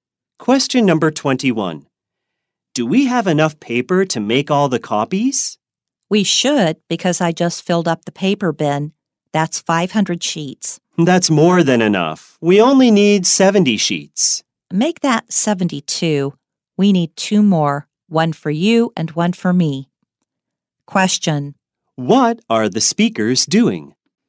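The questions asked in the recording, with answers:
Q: What are the speakers doing?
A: Making copies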